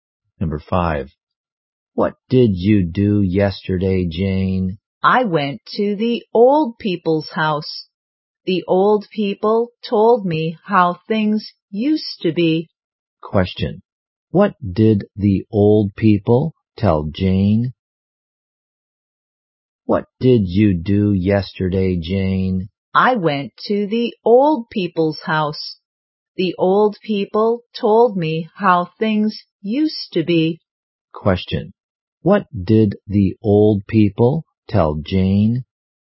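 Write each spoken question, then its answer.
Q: What did the old people tell Jane?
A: How things used to be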